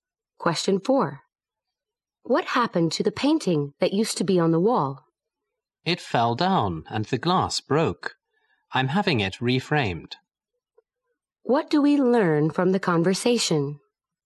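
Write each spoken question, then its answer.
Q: What do we learn from the conversation?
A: The painting fell and is being reframed.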